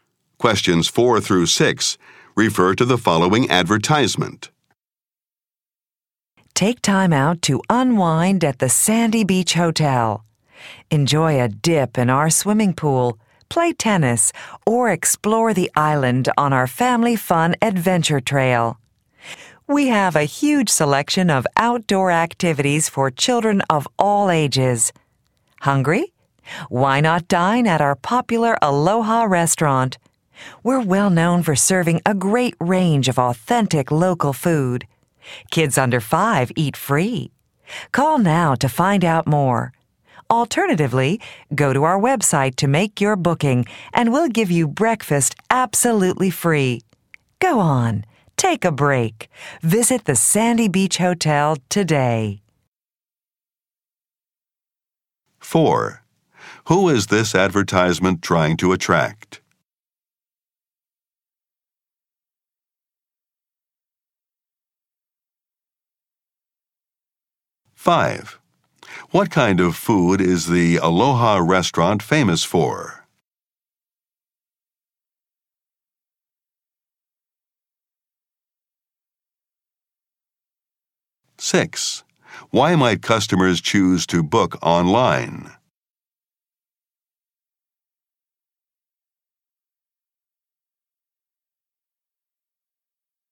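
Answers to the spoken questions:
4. Families with children
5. Authentic local food
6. To get free breakfast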